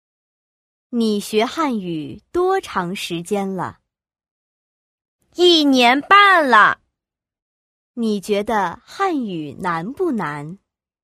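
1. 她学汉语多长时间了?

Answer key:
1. 一年半

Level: YCT 4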